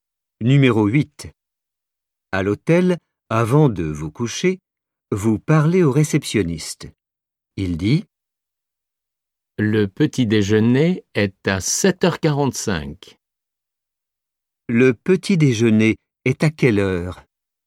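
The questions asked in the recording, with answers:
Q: Le petit déjeuner est à quelle heure ?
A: à 7h45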